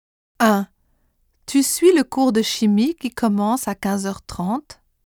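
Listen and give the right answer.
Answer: qui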